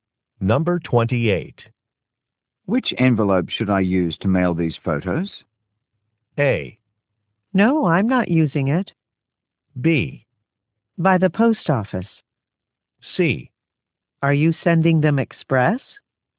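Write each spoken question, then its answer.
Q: Which envelope should I use to mail these photos?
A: C: Are you sending them express?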